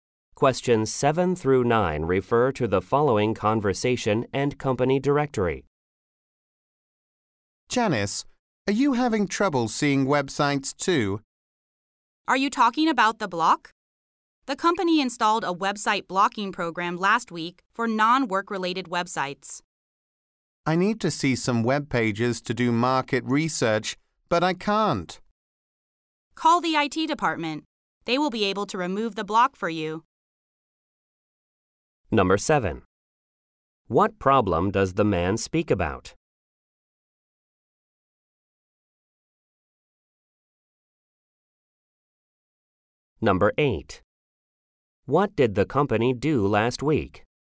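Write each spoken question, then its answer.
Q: What problem does the man speak about?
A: He can't see some websites

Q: What did the company do last week?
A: Installed a website blocking program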